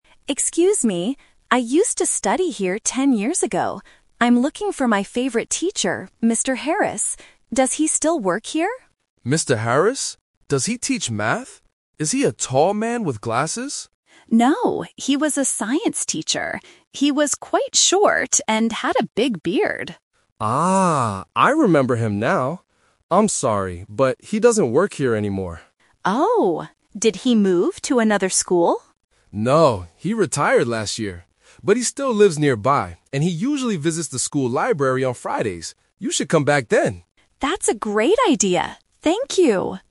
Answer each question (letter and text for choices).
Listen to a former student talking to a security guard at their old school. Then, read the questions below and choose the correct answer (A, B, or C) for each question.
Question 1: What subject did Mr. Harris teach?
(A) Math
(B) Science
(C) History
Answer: (B) Science

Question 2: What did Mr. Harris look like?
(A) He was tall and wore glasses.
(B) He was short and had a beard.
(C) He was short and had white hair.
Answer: (B) He was short and had a beard.

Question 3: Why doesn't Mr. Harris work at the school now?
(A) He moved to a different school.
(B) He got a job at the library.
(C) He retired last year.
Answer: (C) He retired last year.

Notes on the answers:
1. The student clearly says, "No, he was a science teacher." Option (A) is a trap; the guard asks if he teaches math, but the student says no. Option (C) is a common school subject but is never mentioned in the conversation.
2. The student describes the teacher by saying, "He was quite short and had a big beard." Option (A) is a trap; this is the guard's incorrect guess about the teacher's appearance. Option (C) is a plausible description of an older man, but white hair is not mentioned.
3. The guard says, "No, he retired last year." Option (A) is a trap; the student asks if he moved to another school, but the guard says no. Option (B) is a trap; the audio says he visits the school library on Fridays, not that he works there.

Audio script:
Student: Excuse me. I used to study here ten years ago. I'm looking for my favorite teacher, Mr. Harris. Does he still work here?
Guard: Mr. Harris? Does he teach math? Is he a tall man with glasses?
Student: No, he was a science teacher. He was quite short and had a big beard.
Guard: Ah, I remember him now! I'm sorry, but he doesn't work here anymore.
Student: Oh, did he move to another school?
Guard: No, he retired last year. But he still lives nearby, and he usually visits the school library on Fridays. You should come back then!